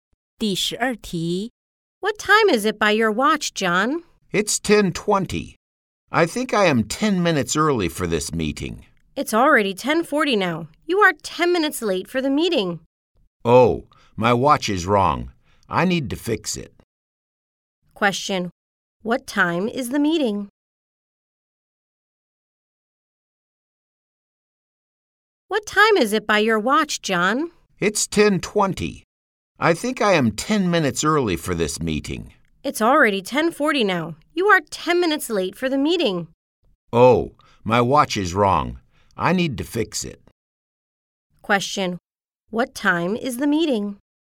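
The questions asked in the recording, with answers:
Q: What time is the meeting?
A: 10:30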